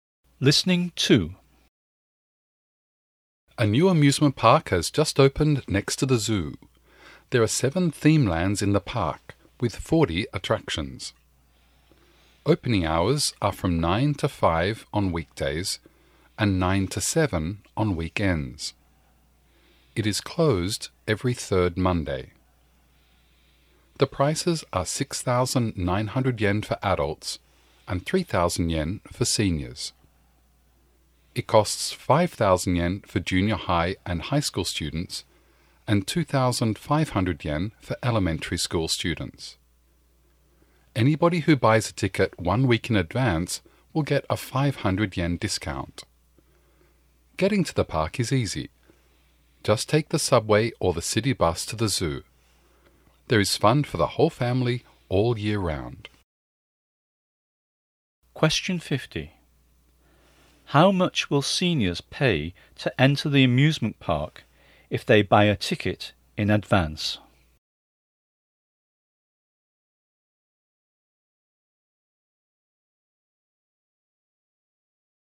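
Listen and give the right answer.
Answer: 2,500 yen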